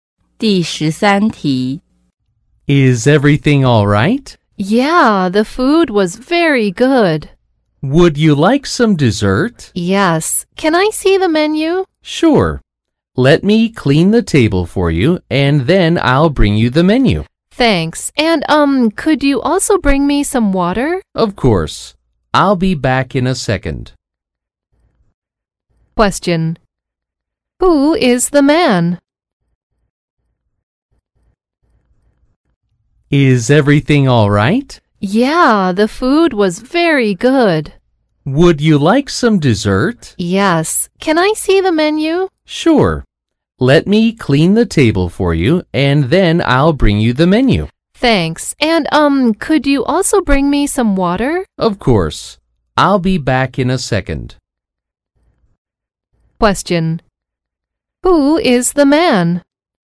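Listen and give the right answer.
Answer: A waiter at a restaurant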